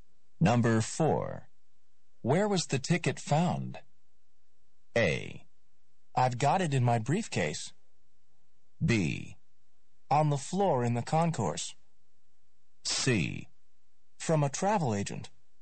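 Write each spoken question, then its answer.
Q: Where was the ticket found?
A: B: On the floor in the concourse.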